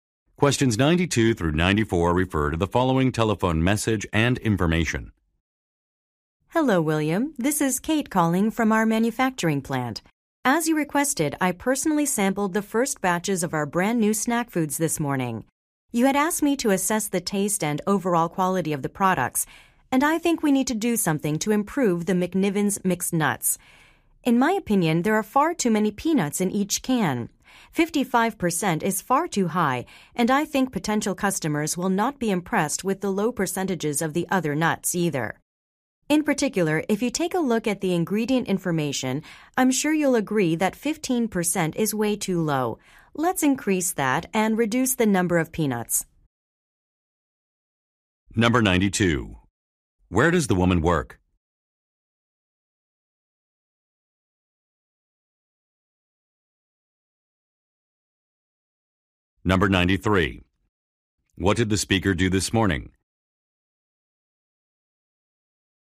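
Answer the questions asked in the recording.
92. At a manufacturing plant
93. Sampled new snack food products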